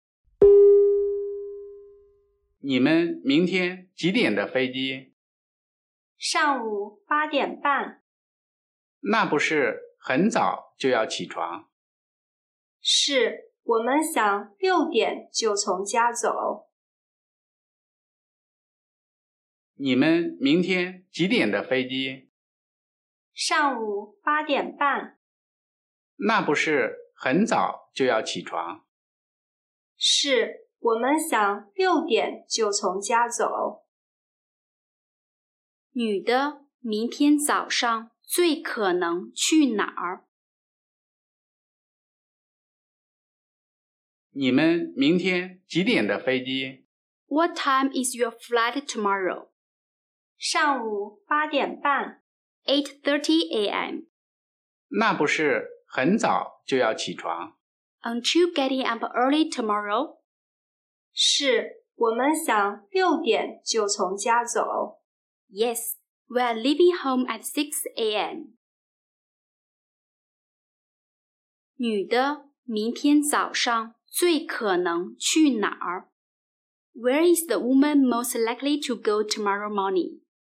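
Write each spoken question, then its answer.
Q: 女的明天早上最可能去哪儿?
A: 机场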